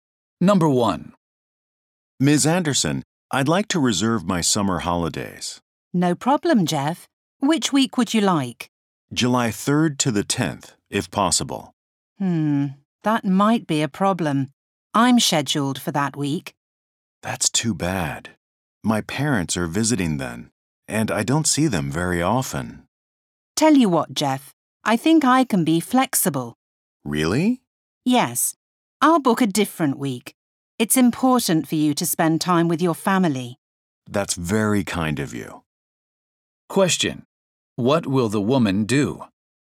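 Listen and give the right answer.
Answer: Take her holiday in a different week so Jeff can have July 3rd to 10th.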